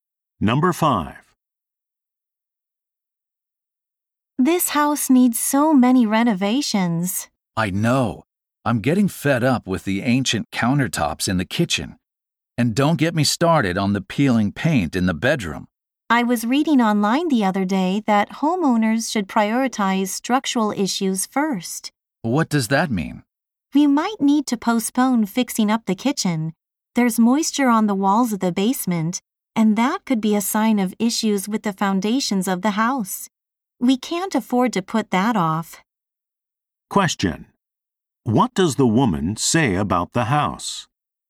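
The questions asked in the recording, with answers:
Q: What does the woman say about the house?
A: The possible foundation problem should be fixed before the kitchen.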